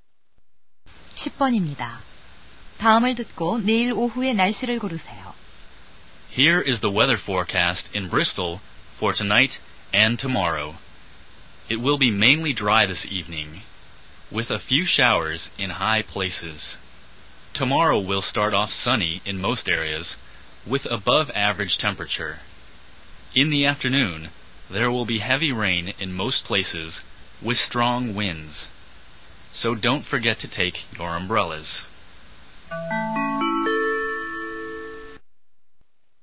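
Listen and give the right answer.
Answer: 강풍을 동반한 폭우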